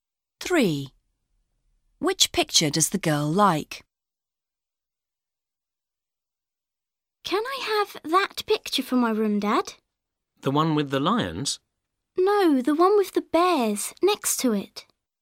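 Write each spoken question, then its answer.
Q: Which picture does the girl like?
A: The one with the bears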